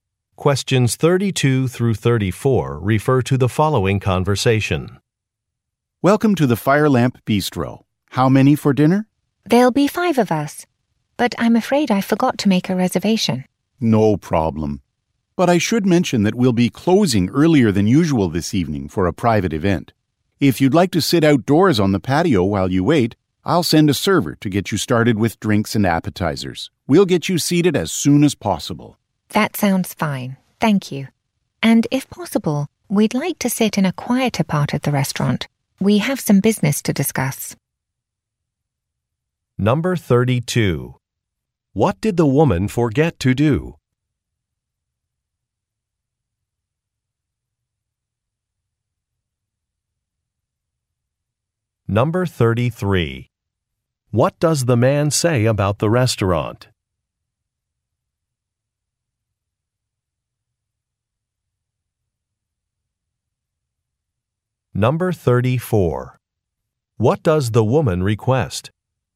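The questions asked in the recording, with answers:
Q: What did the woman forget to do?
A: Make a reservation

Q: What does the man say about the restaurant?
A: It will close earlier than usual tonight for a private event

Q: What does the woman request?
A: A table in a quieter part of the restaurant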